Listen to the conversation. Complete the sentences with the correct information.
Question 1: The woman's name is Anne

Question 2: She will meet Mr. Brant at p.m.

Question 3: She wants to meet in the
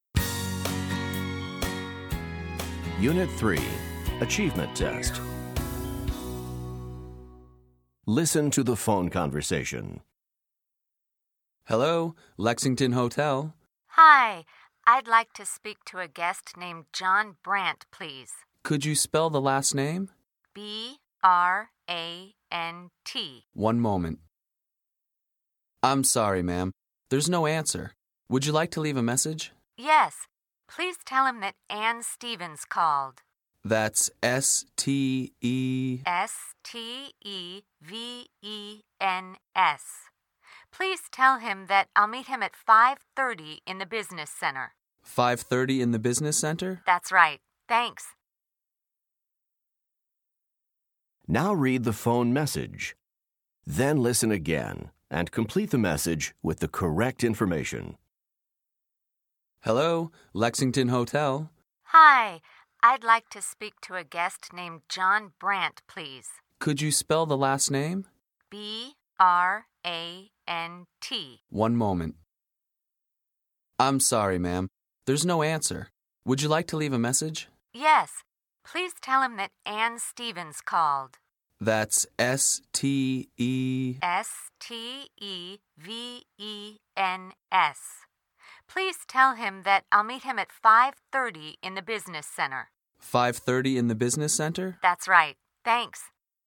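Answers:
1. Stevens
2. 5:30
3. business center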